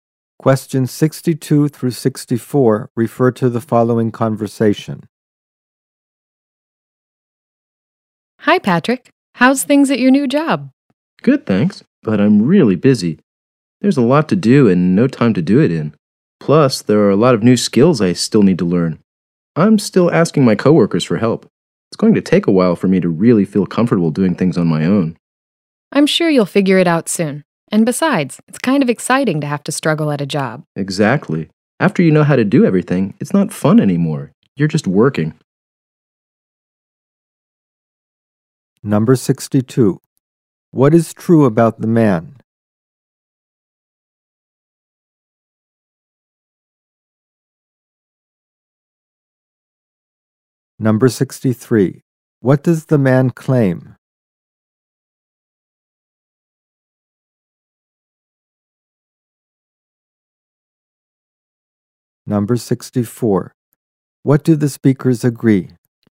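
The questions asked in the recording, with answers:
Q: What do the speakers agree?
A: Struggling at a job is exciting; once you know everything it's not fun.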